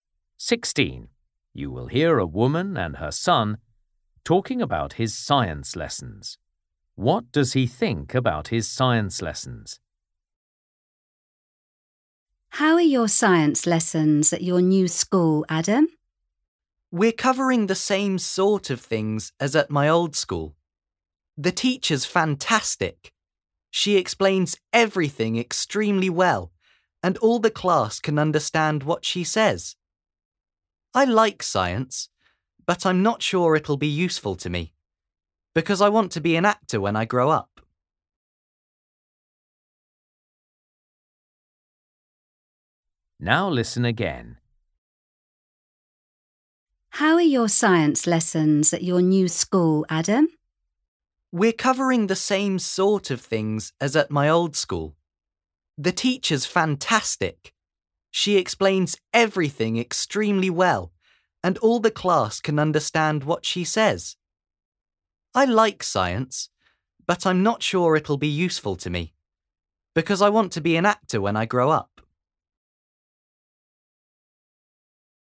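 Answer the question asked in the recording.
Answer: The teacher explains things very well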